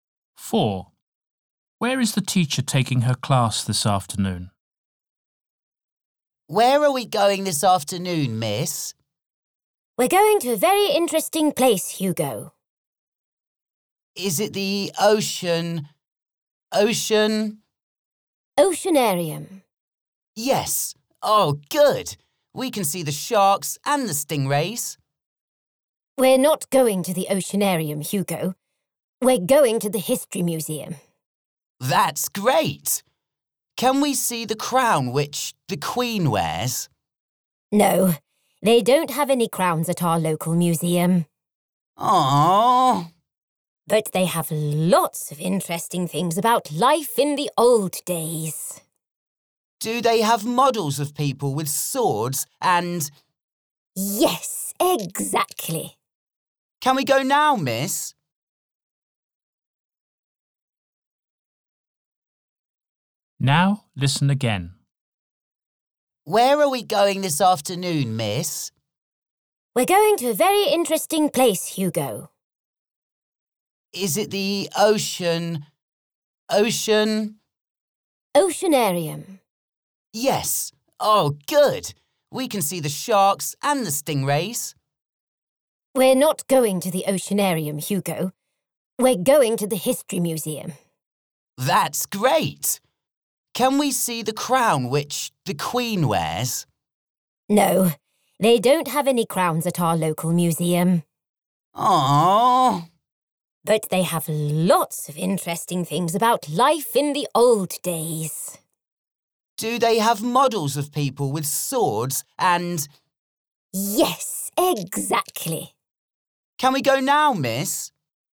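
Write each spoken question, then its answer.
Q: Where is the teacher taking her class this afternoon?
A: The History Museum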